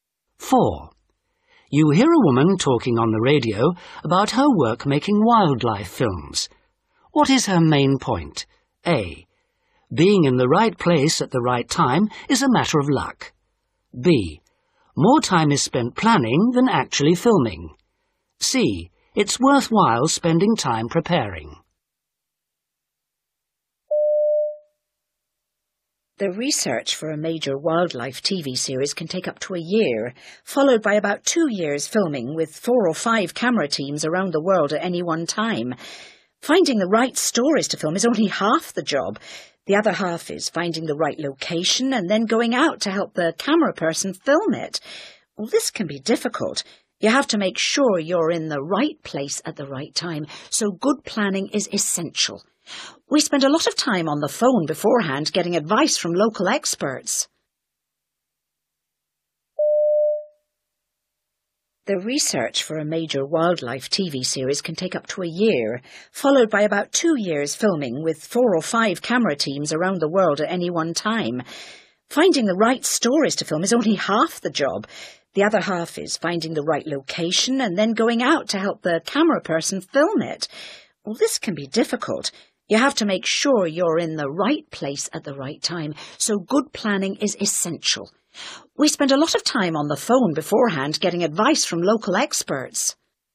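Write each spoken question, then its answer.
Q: What is her main point?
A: C: It's worthwhile spending time preparing.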